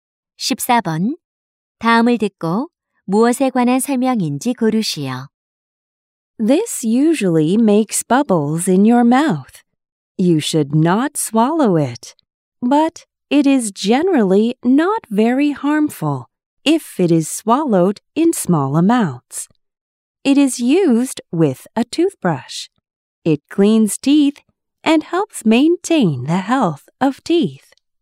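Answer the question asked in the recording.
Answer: 치약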